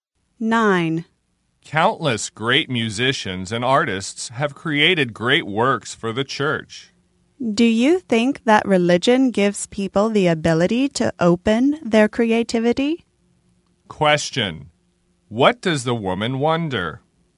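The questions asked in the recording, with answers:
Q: What does the woman wonder?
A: Whether religion gives people the ability to open their creativity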